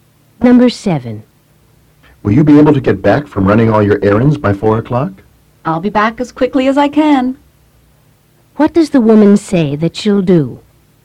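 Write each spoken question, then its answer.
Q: What does the woman say that she'll do?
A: Return as quickly as possible.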